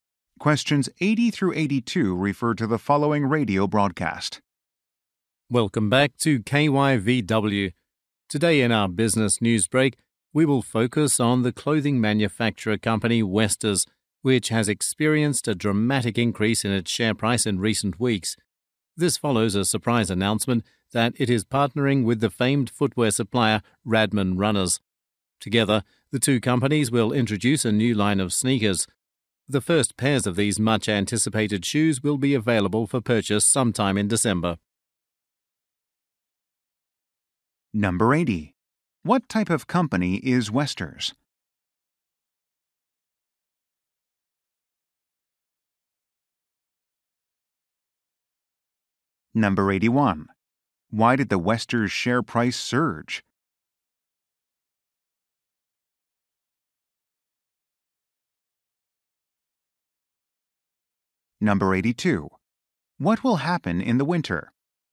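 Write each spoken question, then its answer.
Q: What type of company is Westers?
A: A clothing manufacturer

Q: Why did the Westers share price surge?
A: It announced a partnership with Radman Runners

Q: What will happen in the winter?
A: A new line of sneakers will go on sale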